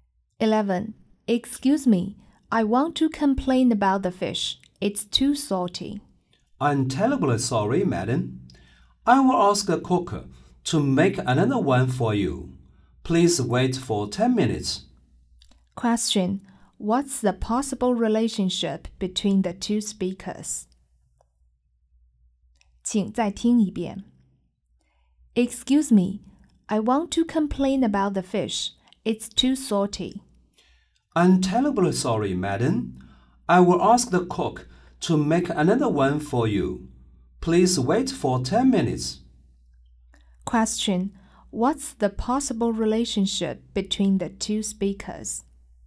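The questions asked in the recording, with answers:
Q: Question: What's the possible relationship between the two speakers?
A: Customer and waiter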